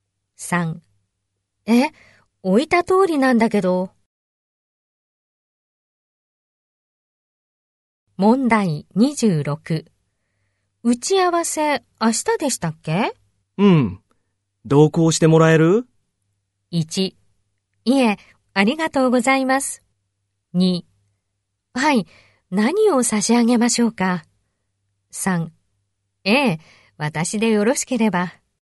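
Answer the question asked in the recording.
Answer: 3: ええ、私でよろしければ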